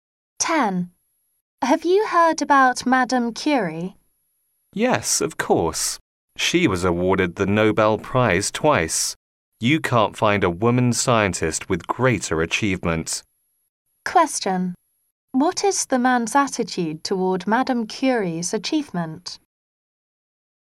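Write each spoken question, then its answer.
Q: What is the man's attitude toward Madame Curie's achievement?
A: Admiring; he thinks it is the greatest among women scientists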